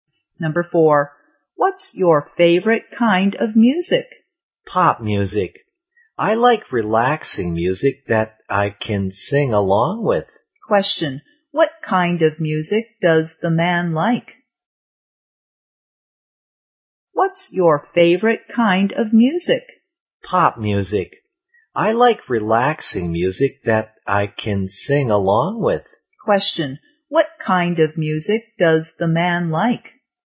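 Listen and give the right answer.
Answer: Pop music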